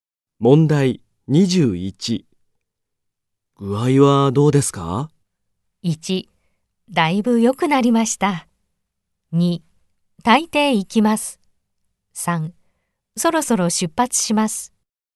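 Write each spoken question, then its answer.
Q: 具合はどうですか?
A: 1: だいぶ良くなりました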